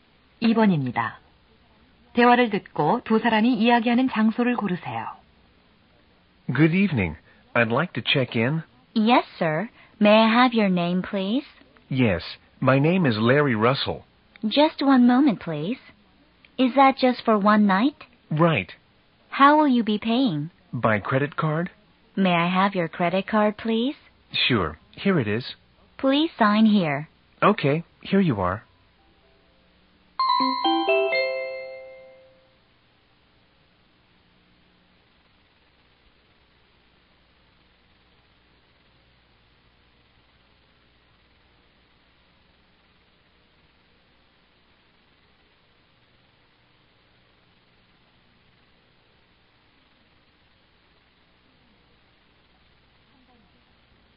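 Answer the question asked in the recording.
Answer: 호텔 프런트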